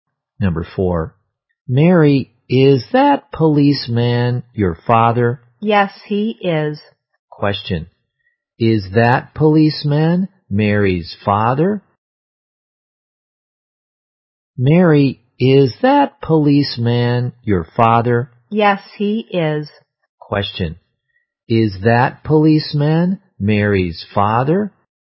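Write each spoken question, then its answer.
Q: is that policeman Mary's father?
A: Yes, he is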